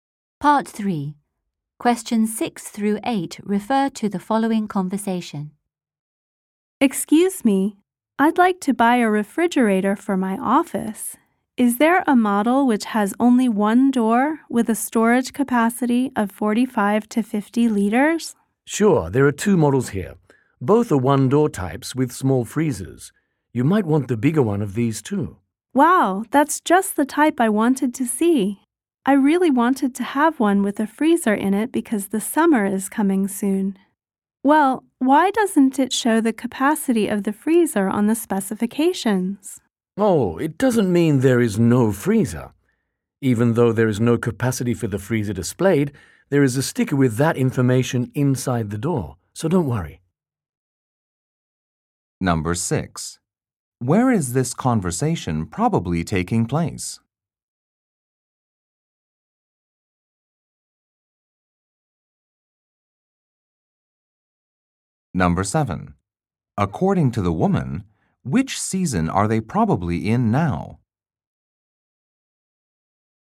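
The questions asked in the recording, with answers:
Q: Where is this conversation probably taking place?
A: At an appliance store

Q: According to the woman, which season are they probably in now?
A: Spring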